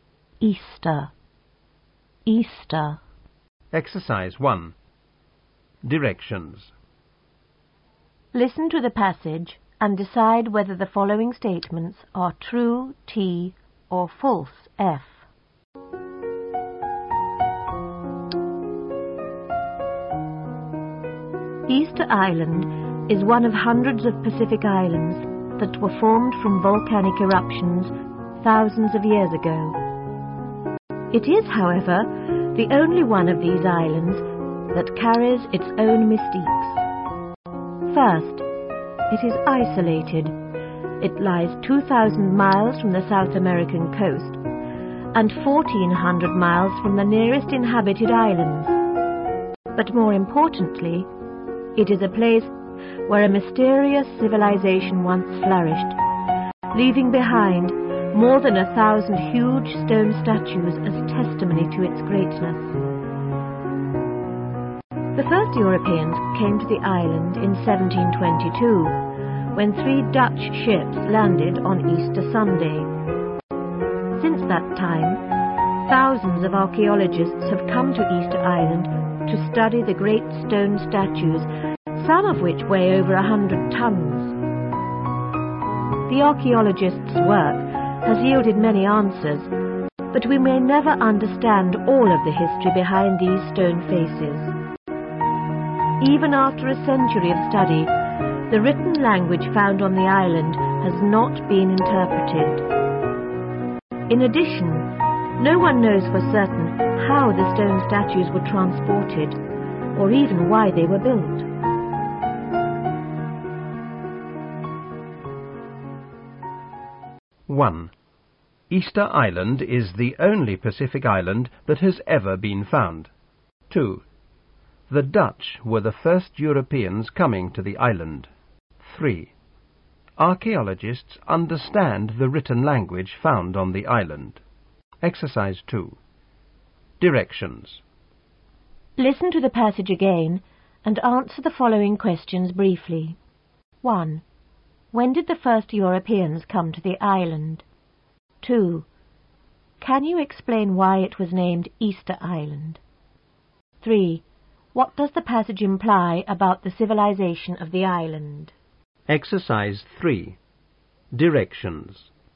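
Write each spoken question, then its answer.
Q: When did the first Europeans come to the island?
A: In 1722

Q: Can you explain why it was named Easter Island?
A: The Dutch ships landed there on Easter Sunday

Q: What does the passage imply about the civilization of the island?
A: It was once a great, flourishing civilization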